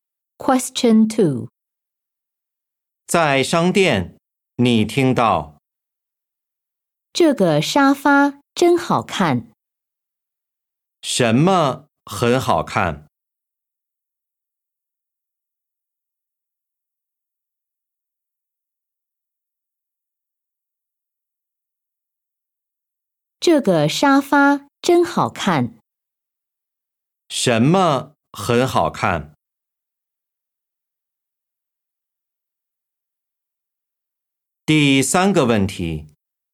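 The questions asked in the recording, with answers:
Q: 什么很好看?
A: 沙发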